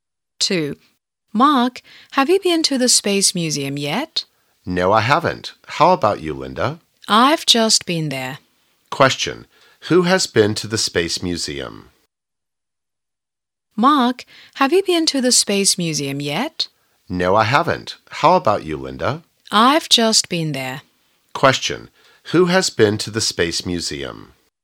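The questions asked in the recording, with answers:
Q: Who has been to the Space Museum?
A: Linda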